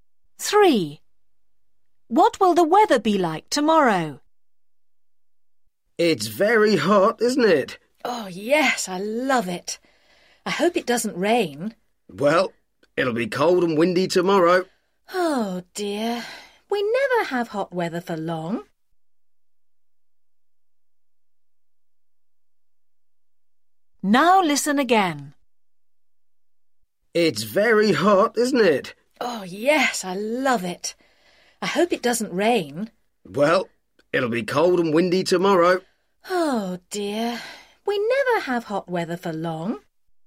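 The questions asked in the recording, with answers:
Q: What will the weather be like tomorrow?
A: cold and windy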